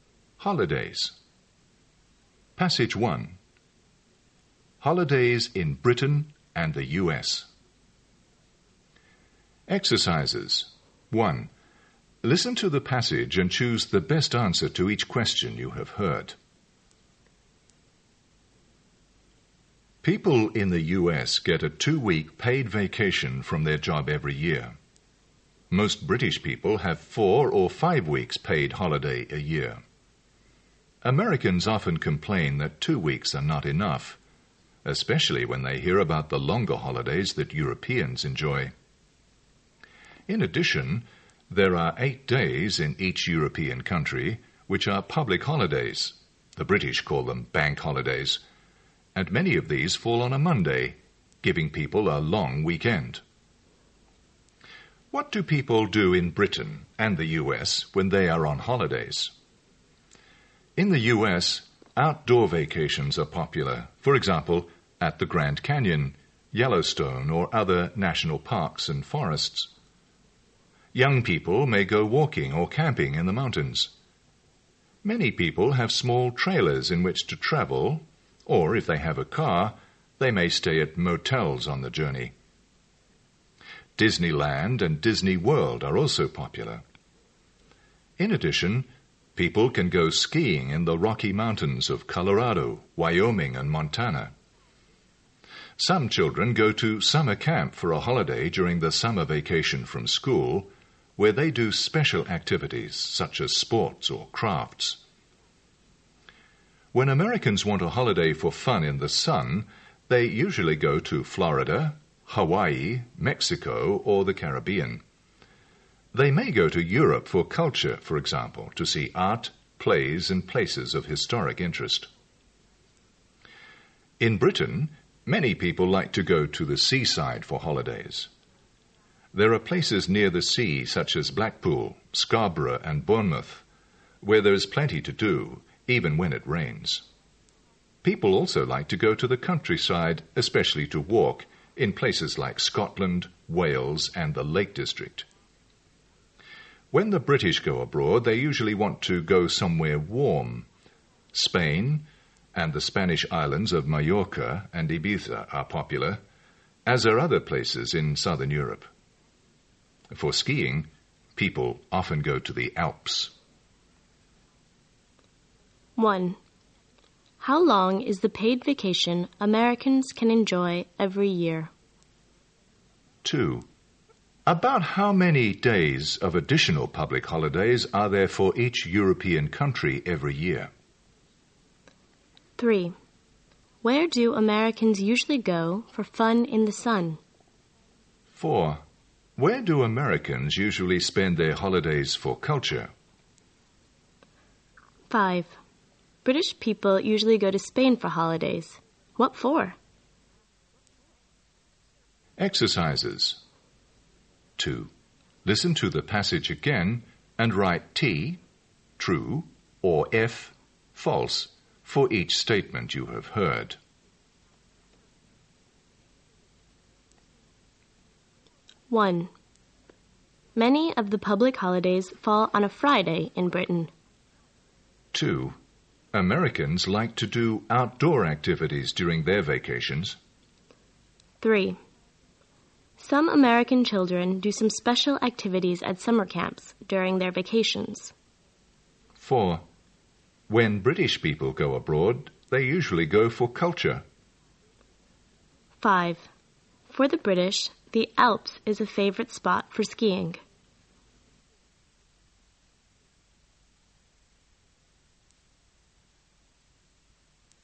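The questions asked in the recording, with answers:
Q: How long is the paid vacation Americans can enjoy every year?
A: Two weeks

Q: About how many days of additional public holidays are there for each European country every year?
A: 8 days

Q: Where do Americans usually go for fun in the sun?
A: Florida, Hawaii, Mexico, or the Caribbean

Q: Where do Americans usually spend their holidays for culture?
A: Europe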